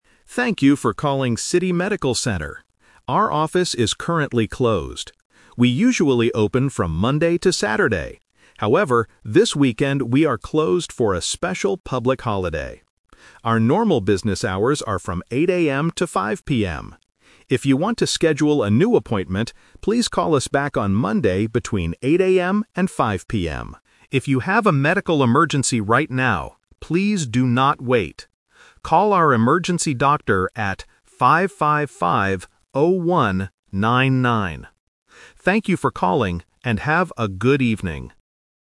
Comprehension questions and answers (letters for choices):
Listen to the voicemail message and choose the correct answer (A, B, or C).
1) Why is the medical center closed this weekend?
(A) It is closed every weekend.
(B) It is a special holiday.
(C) The doctors are sick.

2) When should a customer call back to make a new appointment?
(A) Saturday morning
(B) Monday between 8:00 AM and 5:00 PM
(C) Any time after 5:00 PM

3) What should a customer do if they have an emergency?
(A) Call a different phone number.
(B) Call back on Monday morning.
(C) Wait until the office opens.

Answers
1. B
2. B
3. A

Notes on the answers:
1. The voice says, "However, this weekend we are closed for a special public holiday." Option (A) is a trap because the center "usually open from Monday to Saturday" (so they are normally open on weekends). Option (C) is not mentioned in the audio.
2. The message clearly states, "please call us back on Monday between 8:00 AM and 5:00 PM." Option (A) is a trap because the office is closed this Saturday for the holiday. Option (C) is a trap because 5:00 PM is when the office closes.
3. The voice says, "If you have a medical emergency... Call our emergency doctor at 555-0199." Option (B) and Option (C) are traps because the message specifically says "please do not wait" for emergencies.

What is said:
Automated Voice: Thank you for calling City Medical Center. Our office is currently closed. We usually open from Monday to Saturday. However, this weekend we are closed for a special public holiday. Our normal business hours are from 8:00 AM to 5:00 PM. If you want to schedule a new appointment, please call us back on Monday between 8:00 AM and 5:00 PM. If you have a medical emergency right now, please do not wait. Call our emergency doctor at 555-0199. Thank you for calling, and have a good evening.

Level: A2